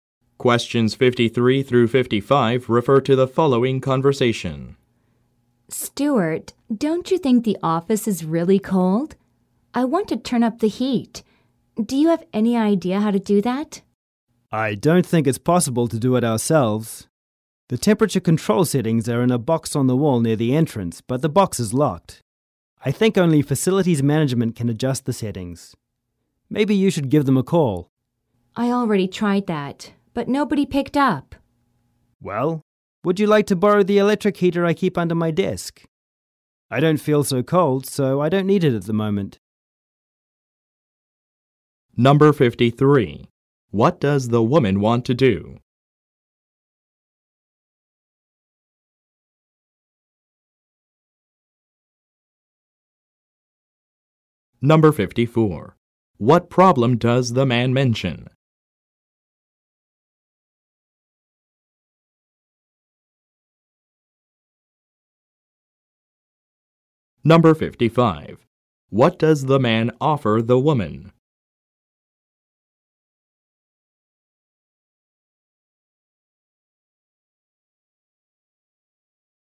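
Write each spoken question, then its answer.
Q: What does the woman want to do?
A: Turn up the heat in the office

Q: What problem does the man mention?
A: The temperature control box is locked

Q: What does the man offer the woman?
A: To lend her his electric heater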